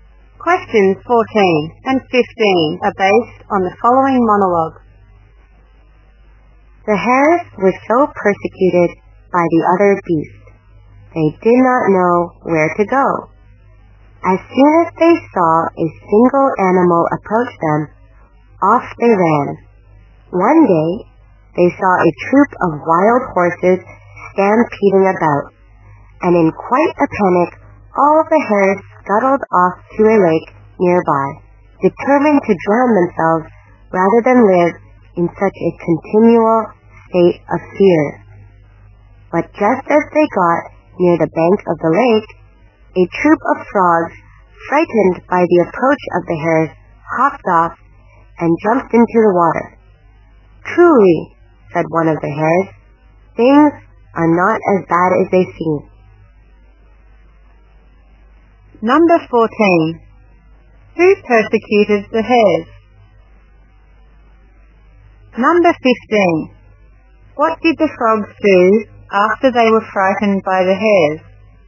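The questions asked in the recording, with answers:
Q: Who persecuted the hares?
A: The other beasts

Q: What did the frogs do after they were frightened by the hares?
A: They hopped off and jumped into the water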